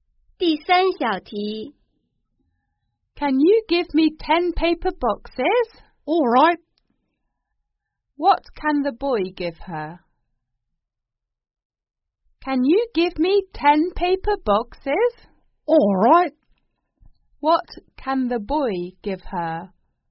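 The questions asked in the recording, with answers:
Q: What can the boy give her?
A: 10 paper boxes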